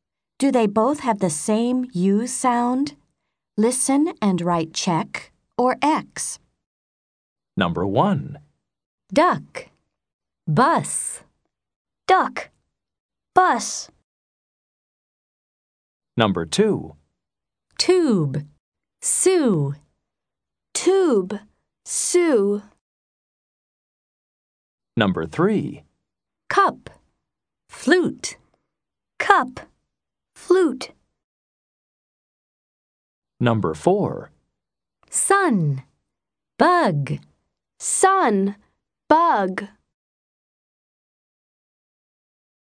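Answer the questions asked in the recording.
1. Yes (check): duck, bus
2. Yes (check): tube, Sue
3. No (X): cup, flute
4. Yes (check): sun, bug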